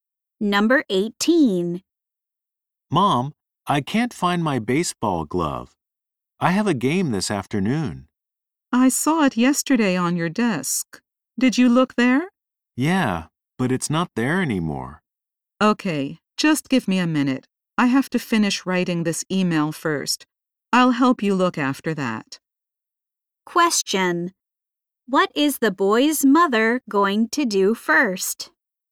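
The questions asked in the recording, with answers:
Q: What is the boy's mother going to do first?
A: Finish writing an email.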